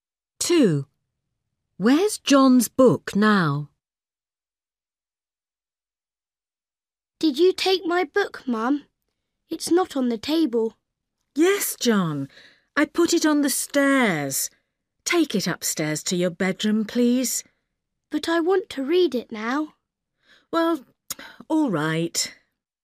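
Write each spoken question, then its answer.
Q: Where's John's book now?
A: on the stairs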